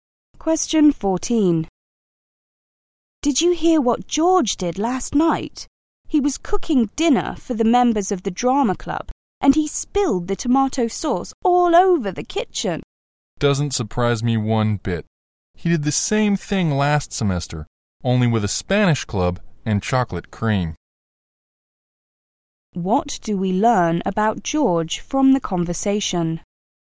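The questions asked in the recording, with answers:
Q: What do we learn about George from the conversation?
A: He is clumsy; he made a similar mess last semester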